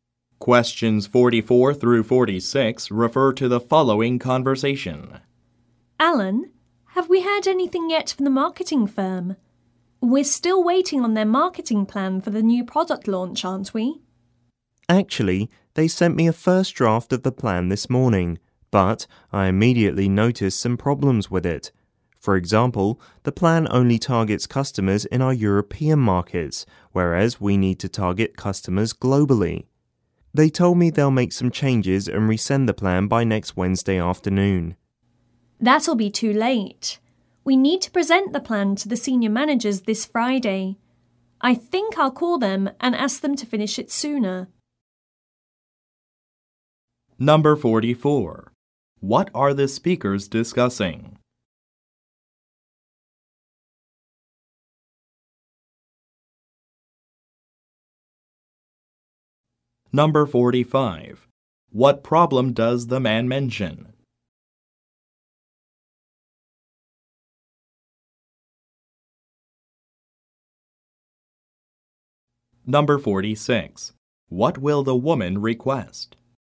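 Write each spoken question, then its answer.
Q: What are the speakers discussing?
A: A marketing plan for a new product launch

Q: What problem does the man mention?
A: The plan only targets European customers instead of global ones

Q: What will the woman request?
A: That the marketing firm finish the plan sooner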